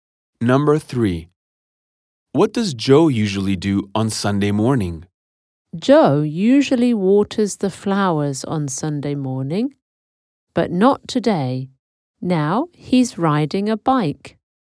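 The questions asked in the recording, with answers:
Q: What does Joe usually do on Sunday morning?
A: Waters the flowers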